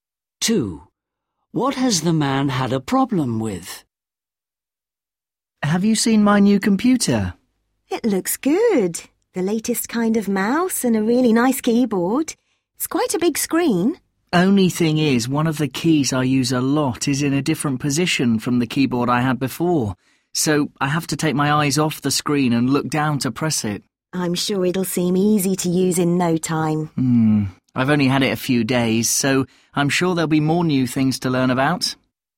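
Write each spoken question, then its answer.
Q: What has the man had a problem with?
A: The keyboard, because one key is in a different position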